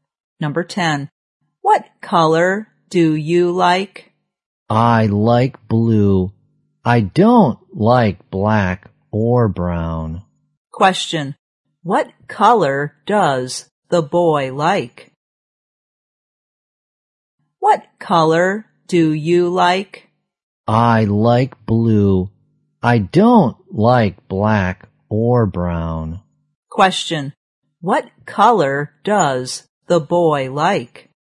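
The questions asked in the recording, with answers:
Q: What color does the boy like?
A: Blue.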